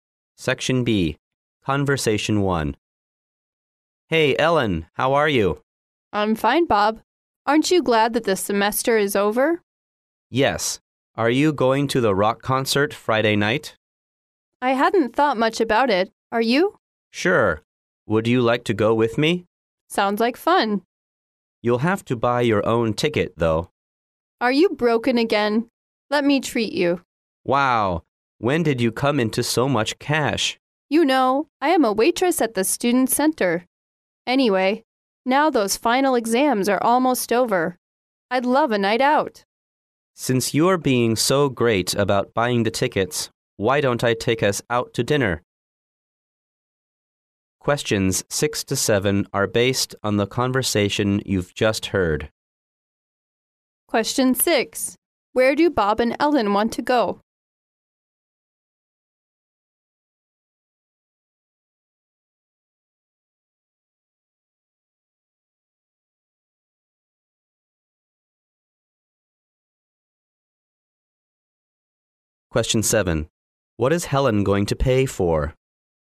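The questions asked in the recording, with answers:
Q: Where do Bob and Ellen want to go?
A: To a rock concert

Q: What is Helen going to pay for?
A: Dinner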